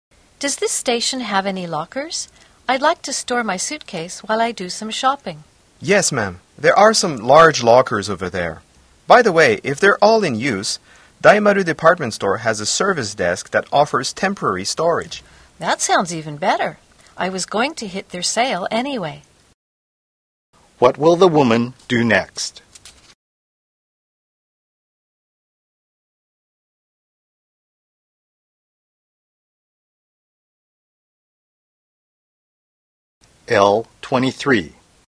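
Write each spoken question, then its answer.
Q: What will the woman do next?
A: Go to Daimaru Department Store to leave her suitcase there and shop at the sale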